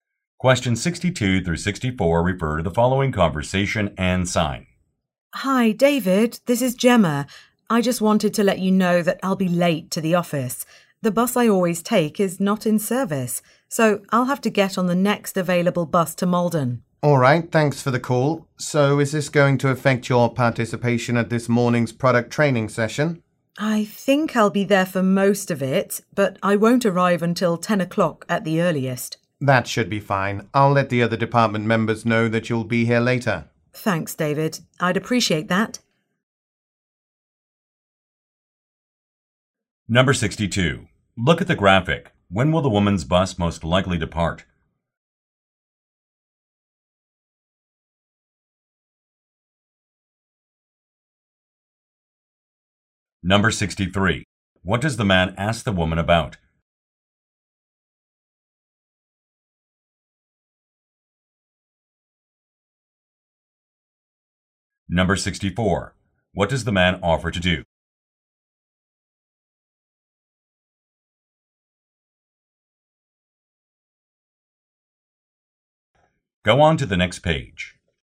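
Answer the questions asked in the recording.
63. Whether she can attend the training session
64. Tell the other department members she'll be late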